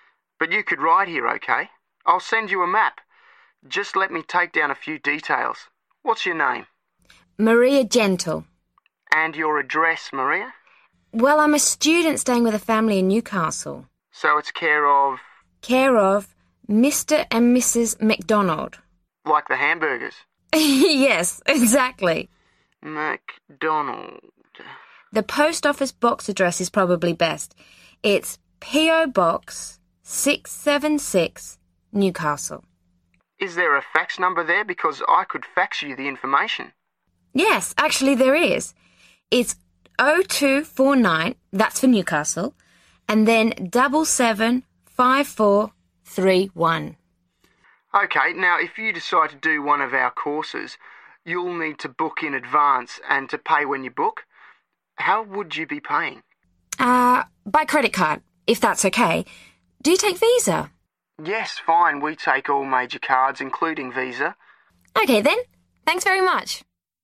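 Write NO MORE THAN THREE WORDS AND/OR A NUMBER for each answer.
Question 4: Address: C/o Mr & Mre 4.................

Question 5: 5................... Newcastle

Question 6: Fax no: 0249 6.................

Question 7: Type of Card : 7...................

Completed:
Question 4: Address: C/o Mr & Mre McDonald
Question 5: P.O. Box 676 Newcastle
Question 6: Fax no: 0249 775431
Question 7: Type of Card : Visa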